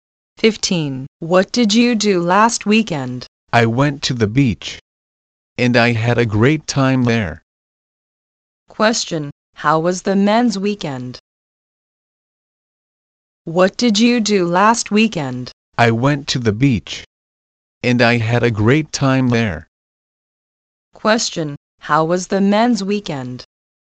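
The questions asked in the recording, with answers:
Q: Question: How was the men's weekend?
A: Great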